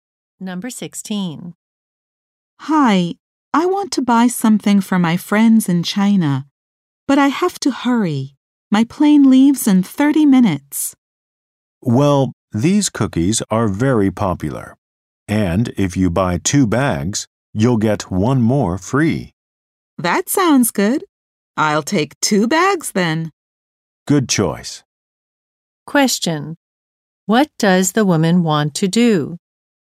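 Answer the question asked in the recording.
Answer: Buy a gift for her friends in China.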